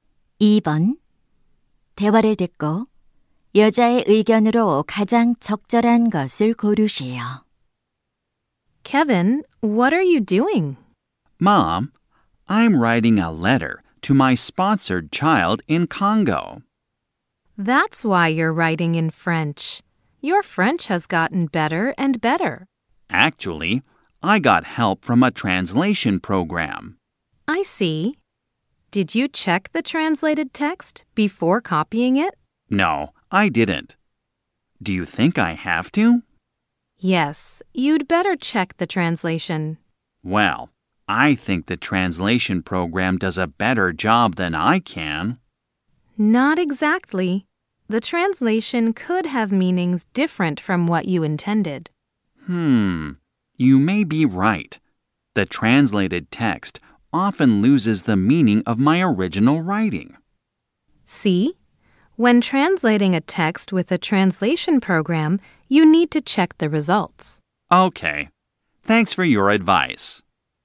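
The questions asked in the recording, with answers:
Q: 대화를 듣고 여자의 의견으로 가장 적절한 것을 고르시오.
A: 번역 프로그램으로 번역한 결과는 확인해야 한다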